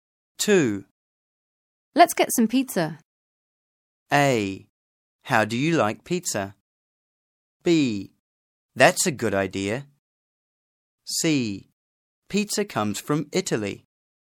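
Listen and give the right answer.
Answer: B: That's a good idea.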